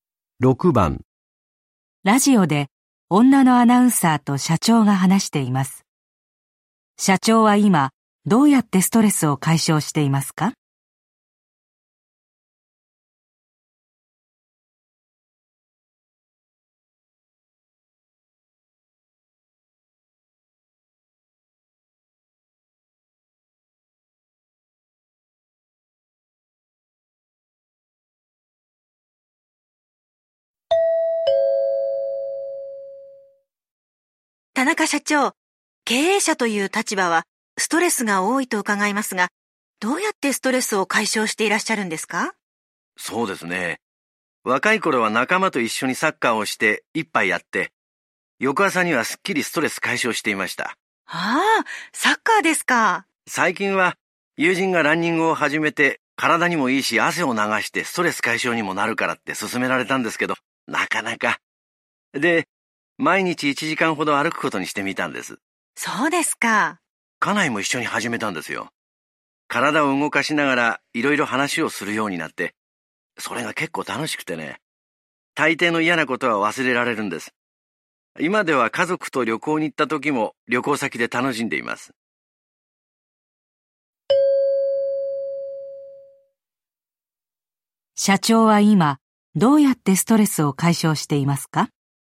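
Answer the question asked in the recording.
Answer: 奥さんと毎日歩きながら話すこと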